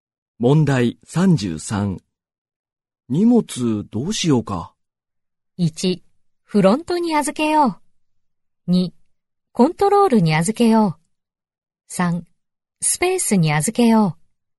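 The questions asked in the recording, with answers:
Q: 荷物どうしようか。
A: 1: フロントに預けよう。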